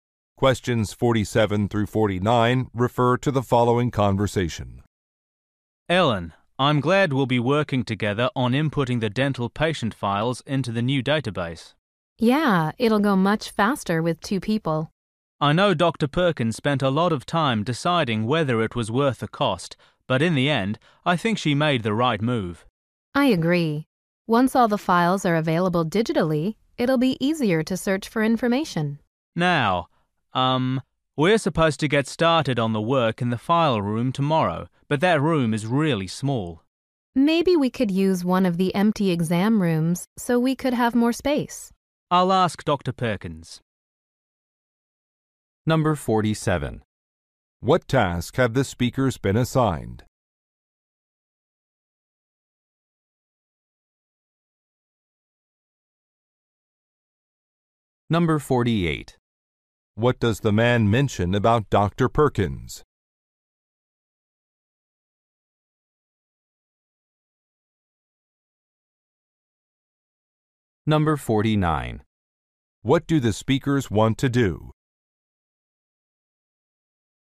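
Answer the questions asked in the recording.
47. Entering patient files into a new database
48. She spent a long time deciding whether the database was worth the cost
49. Work in an empty exam room to have more space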